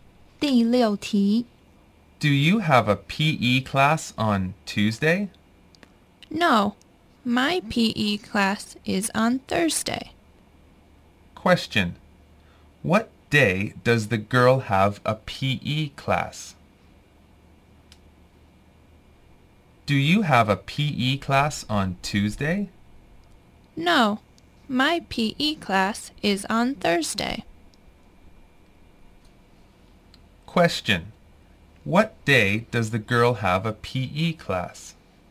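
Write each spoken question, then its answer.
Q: Question, what day does the girl have a PE class?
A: Thursday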